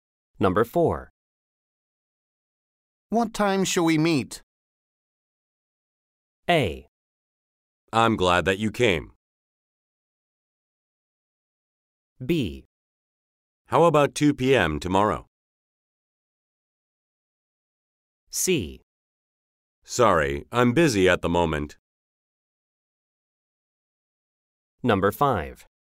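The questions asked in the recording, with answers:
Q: What time shall we meet?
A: B: How about 2 p.m. tomorrow?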